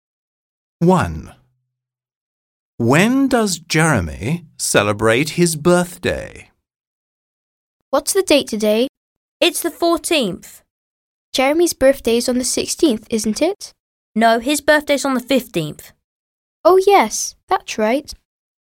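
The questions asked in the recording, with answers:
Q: When does Jeremy celebrate his birthday?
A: On the 15th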